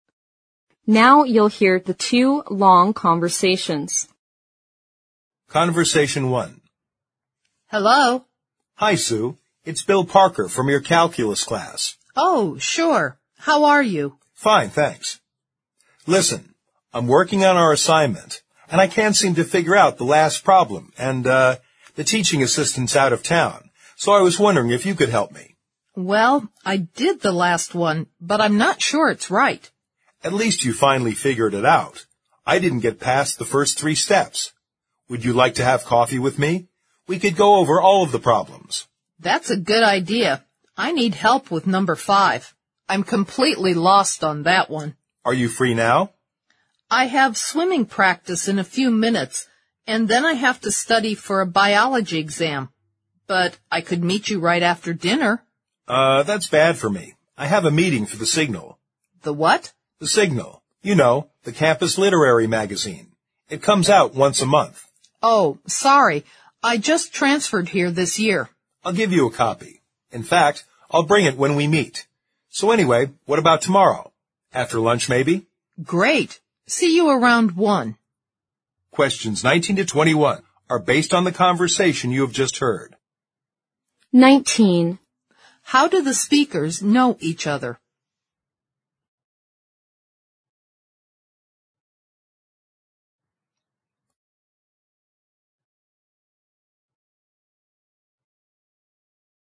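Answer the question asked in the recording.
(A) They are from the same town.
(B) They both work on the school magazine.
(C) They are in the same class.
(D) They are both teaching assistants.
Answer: (C) They are in the same class.

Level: 四级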